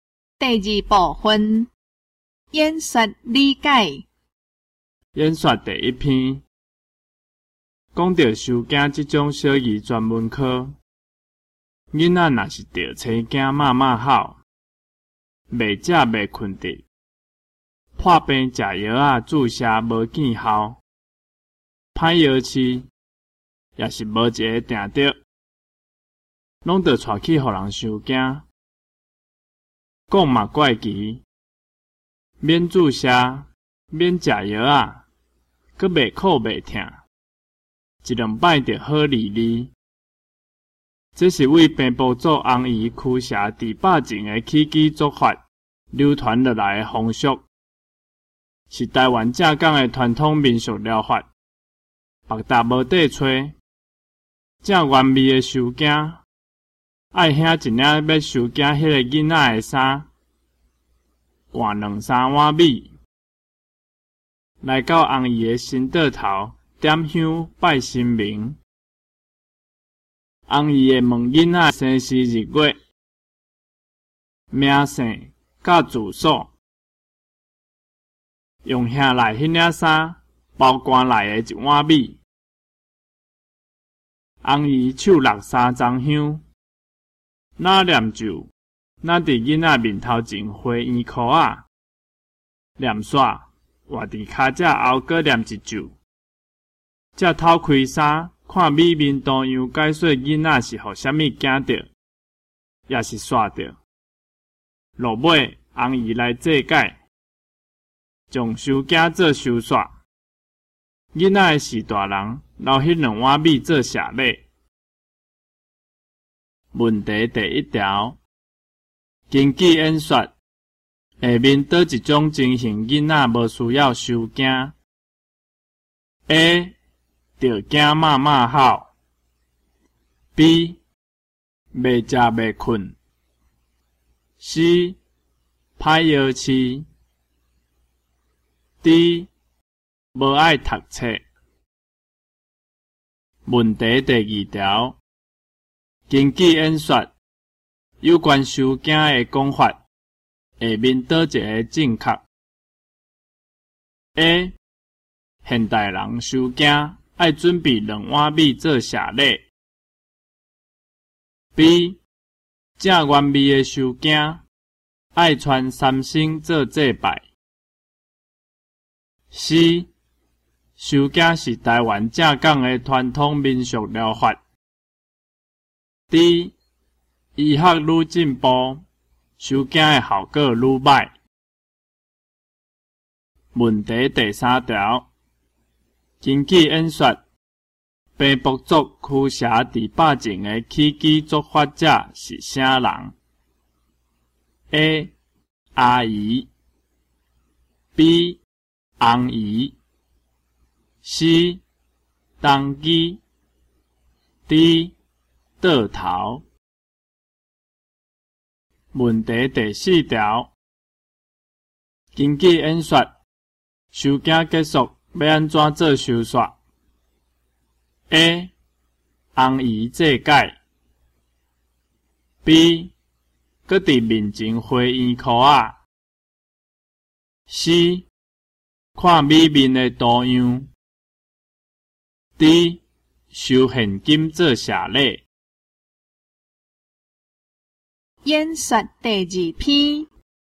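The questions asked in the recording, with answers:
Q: 根据演说,下面倒一种情形囡仔无需要受惊 ?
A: D: 无爱读册

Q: 根据演说有关收件的讲法,下面倒一个正确 ?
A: C: 收件是台湾正港的传统民俗疗法

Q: 根据演说,平埔族驱邪治百病的起居作法者是啥人 ?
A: B: 红姨

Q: 根据演说,收件结束要安怎做收煞 ?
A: A: 红姨祭拜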